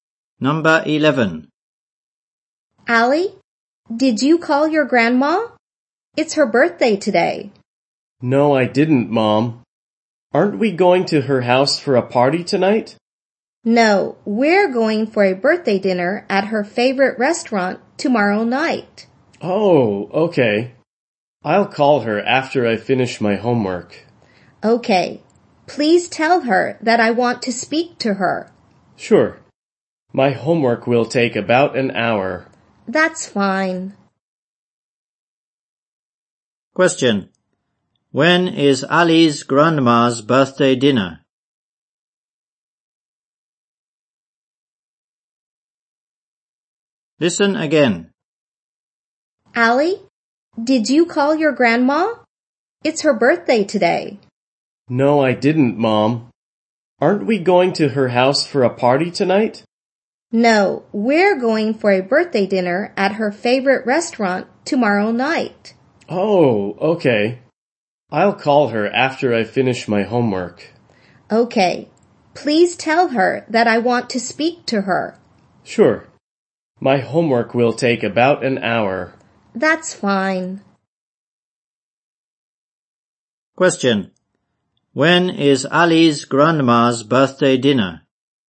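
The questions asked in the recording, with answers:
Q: When is Ali's grandma's birthday dinner?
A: Tomorrow night.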